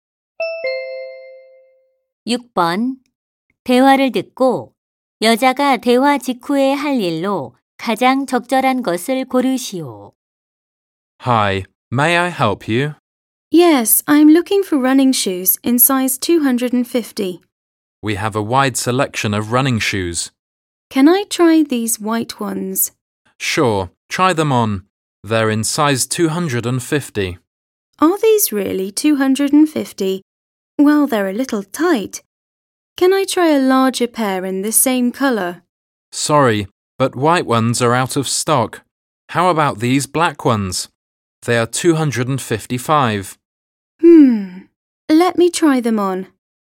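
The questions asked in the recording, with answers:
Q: 대화를 듣고 여자가 대화 직후에 할 일로 가장 적절한 것을 고르시오.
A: 검은색 운동화를 신어 보기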